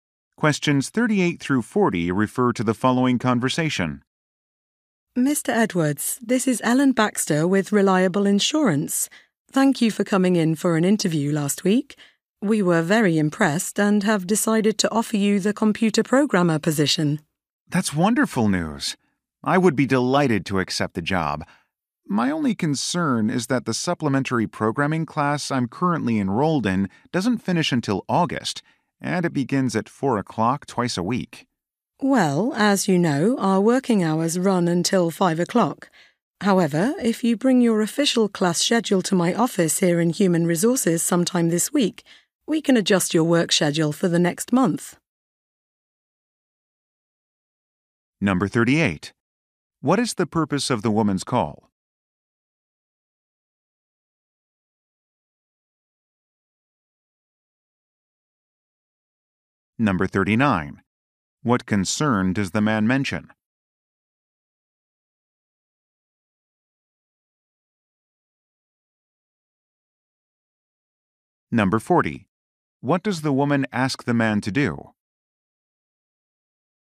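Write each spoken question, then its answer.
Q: What is the purpose of the woman's call?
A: To offer the man a job

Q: What concern does the man mention?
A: His programming class clashes with working hours

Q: What does the woman ask the man to do?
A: Bring his official class schedule to her office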